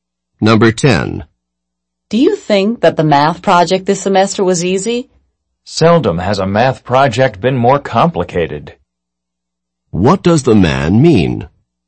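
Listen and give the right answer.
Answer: No, the project was very complicated.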